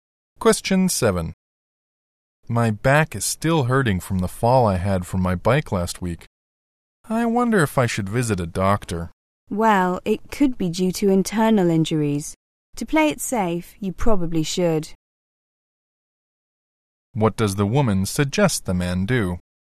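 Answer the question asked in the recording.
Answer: See a doctor.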